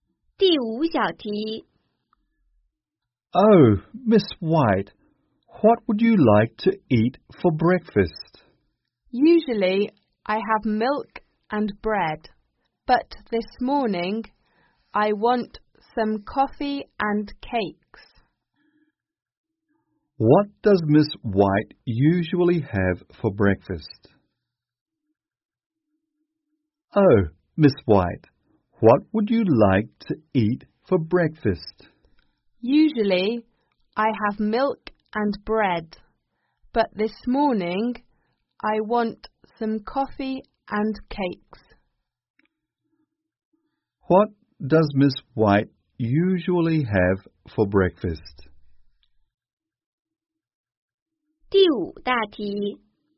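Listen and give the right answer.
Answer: Milk and bread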